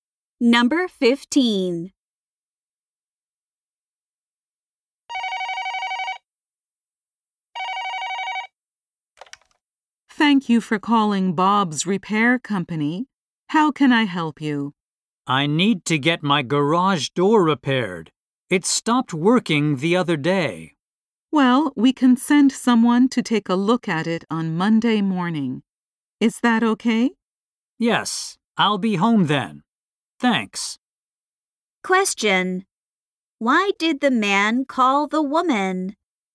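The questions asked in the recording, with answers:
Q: Why did the man call the woman?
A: To get his garage door repaired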